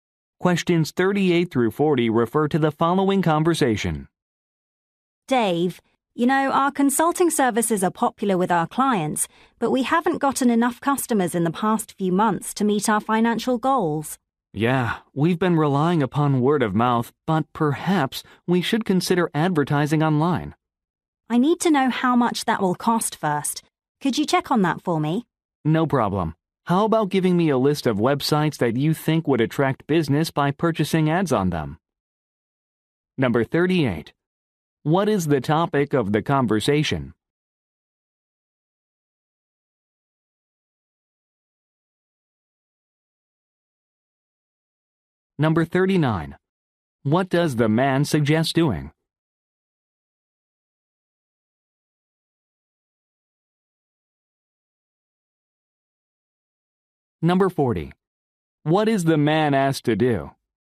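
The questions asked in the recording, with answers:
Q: What is the topic of the conversation?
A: Attracting more customers

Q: What does the man suggest doing?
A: Advertising online

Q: What is the man asked to do?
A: Check the cost of online advertising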